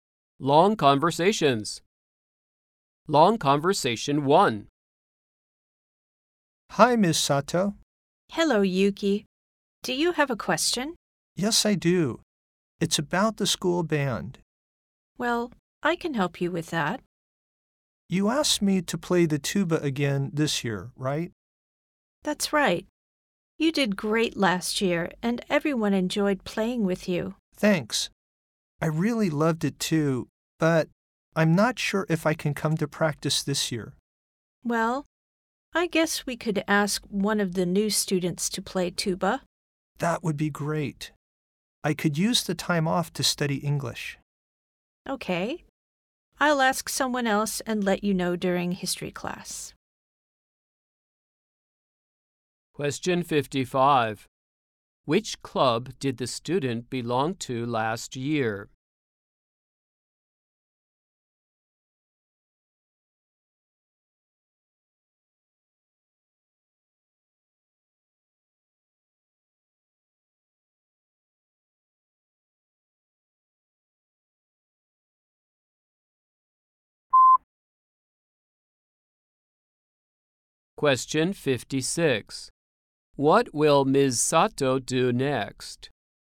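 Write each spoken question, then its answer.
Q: Which club did the student belong to last year?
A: The school band

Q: What will Ms. Sato do next?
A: Ask another student to play the tuba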